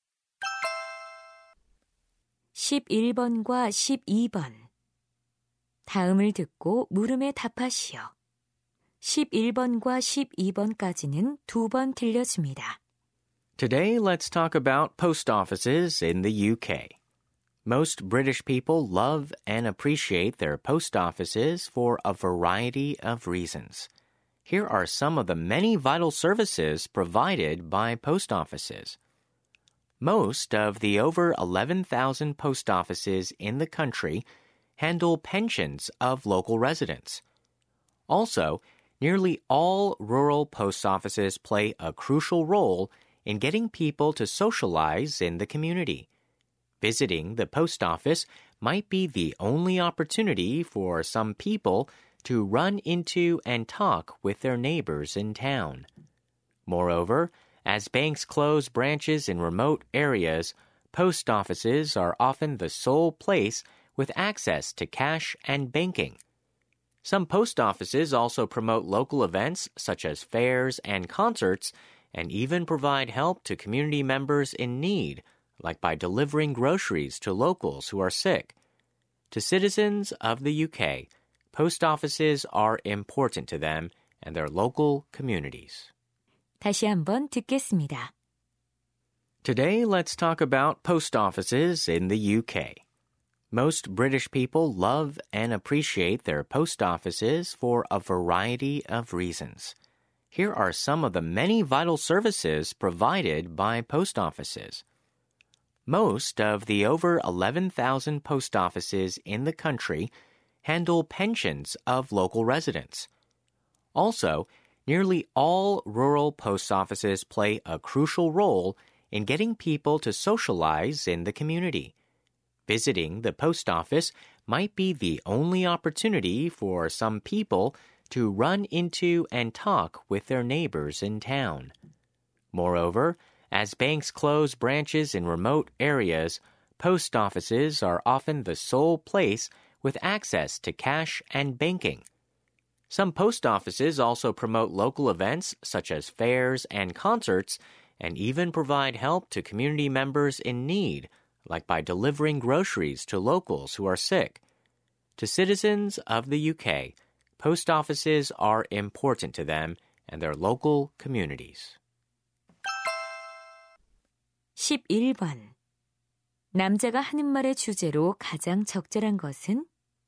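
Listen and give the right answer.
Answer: 영국 우체국이 지역 사회에 중요한 이유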